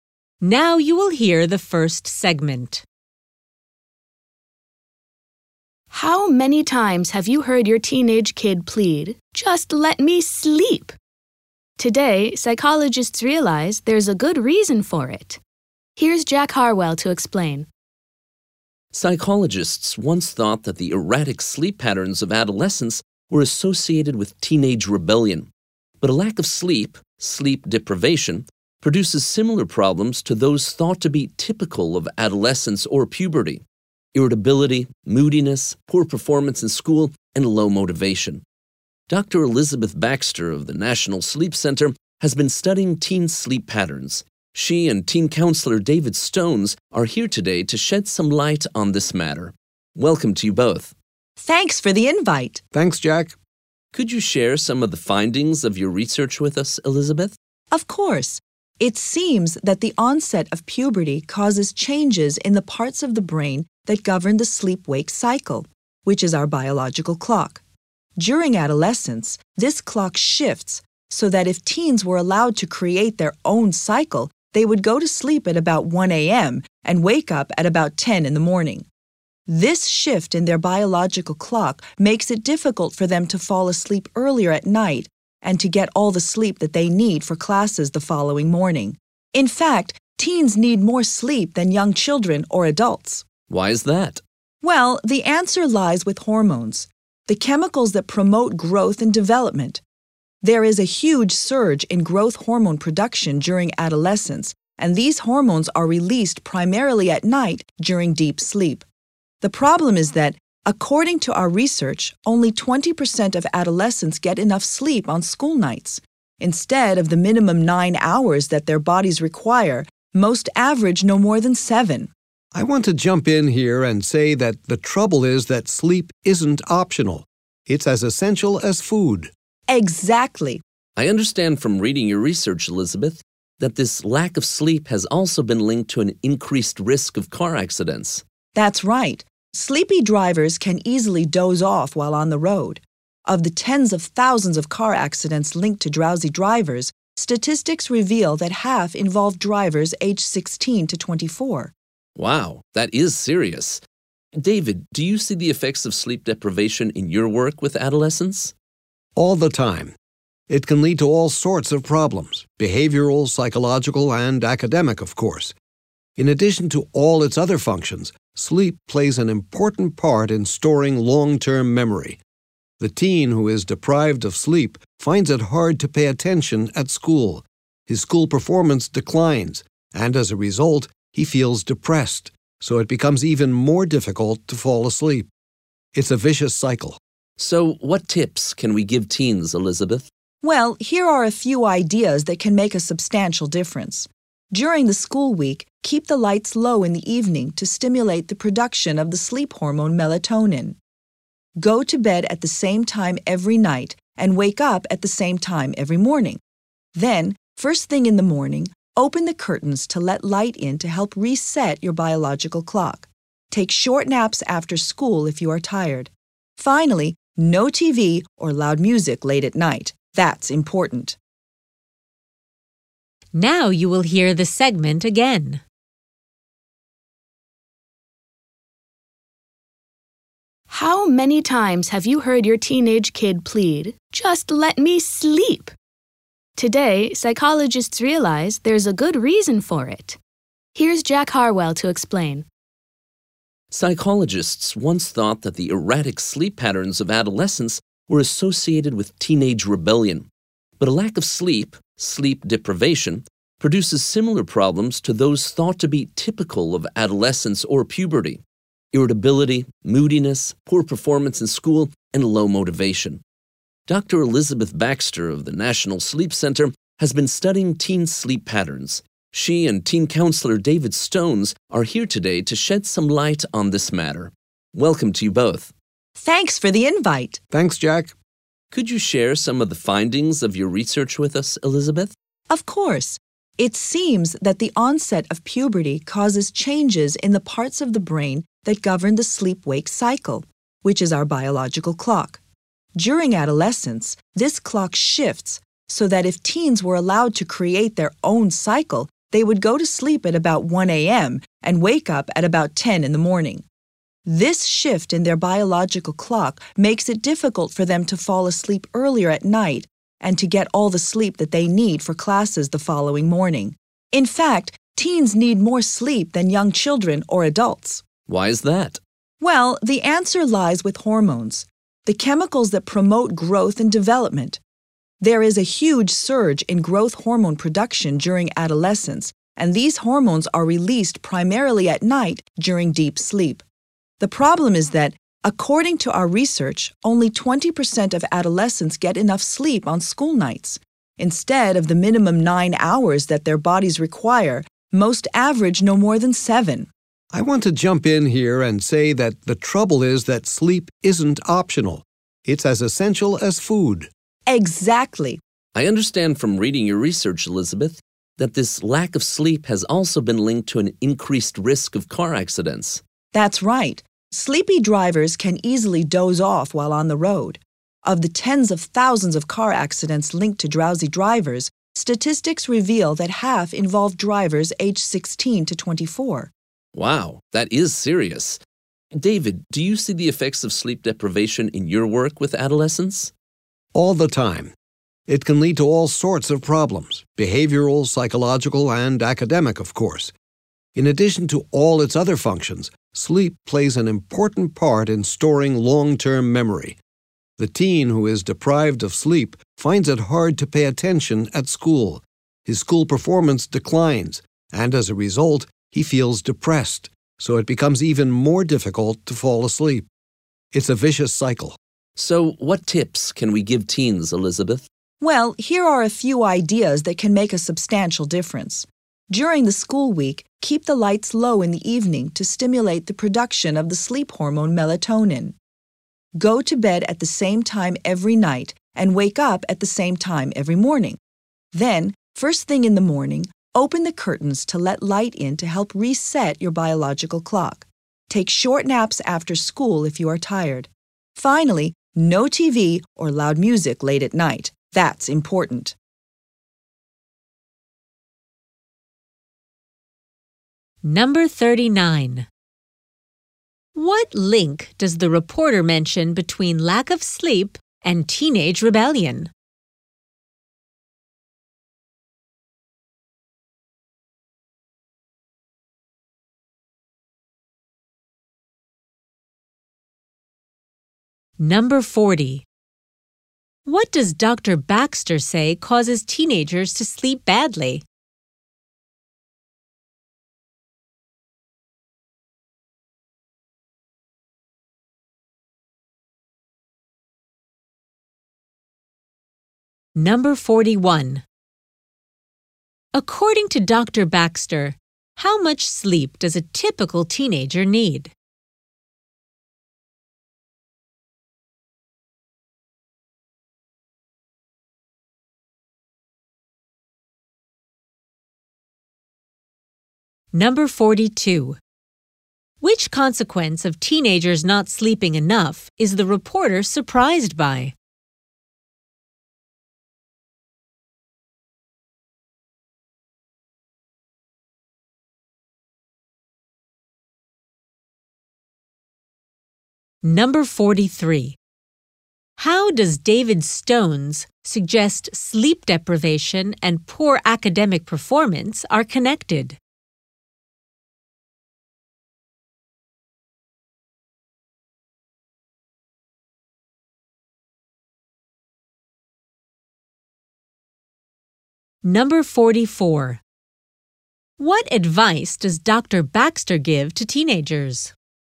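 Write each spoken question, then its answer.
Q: What link does the reporter mention between lack of sleep and teenage rebellion?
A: Lack of sleep causes problems that were thought to be typical of adolescence, such as irritability, moodiness and low motivation

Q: What does Dr. Baxter say causes teenagers to sleep badly?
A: At puberty, their biological clock shifts later

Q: According to Dr. Baxter, how much sleep does a typical teenager need?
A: At least 9 hours

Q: Which consequence of teenagers not sleeping enough is the reporter surprised by?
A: A higher risk of car accidents

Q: How does David Stones suggest sleep deprivation and poor academic performance are connected?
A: They form a vicious cycle: lack of sleep hurts school performance, which causes depression and makes sleeping even harder

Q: What advice does Dr. Baxter give to teenagers?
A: Keep a regular sleep schedule, keep the lights low in the evening, let light in in the morning, take short naps, and avoid TV or loud music late at night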